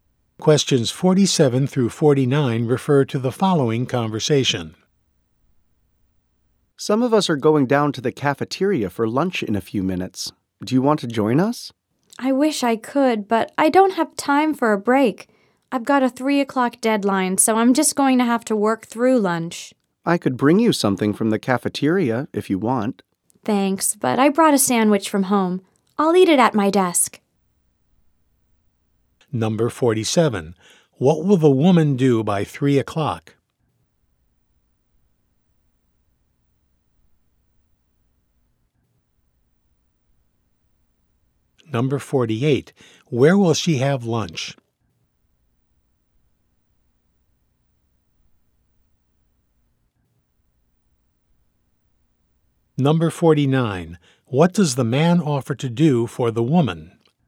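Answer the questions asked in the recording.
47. Finish work to meet a deadline
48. At her desk
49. Bring her something from the cafeteria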